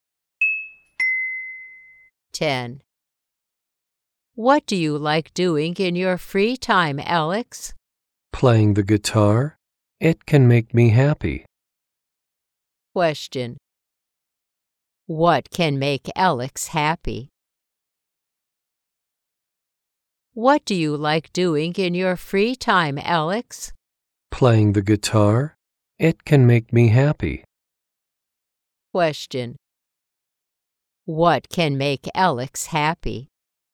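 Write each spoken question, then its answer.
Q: What can make Alex happy?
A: Playing the guitar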